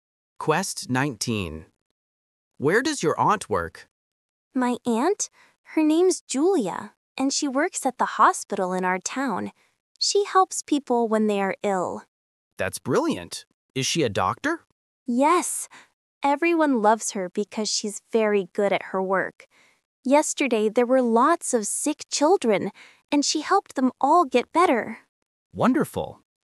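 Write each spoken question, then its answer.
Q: Where does your aunt work?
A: At the hospital in her town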